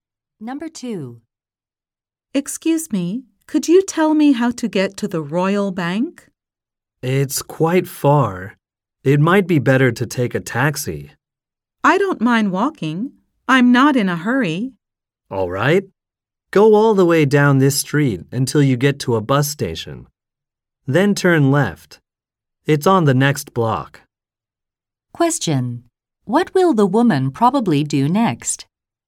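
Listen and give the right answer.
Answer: Walk to the Royal Bank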